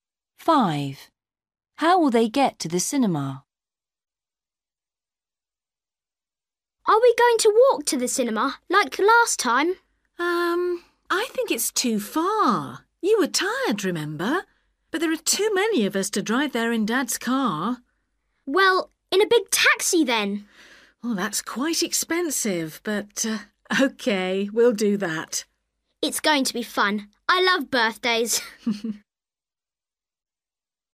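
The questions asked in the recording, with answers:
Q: How will they get to the cinema?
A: by taxi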